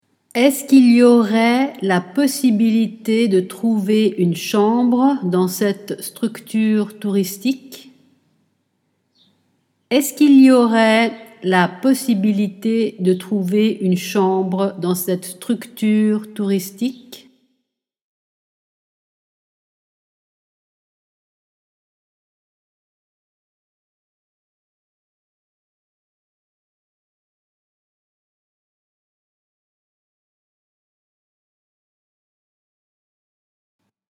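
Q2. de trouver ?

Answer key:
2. Est-ce qu'il y aurait la possibilité / une chambre dans cette structure touristique

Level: A2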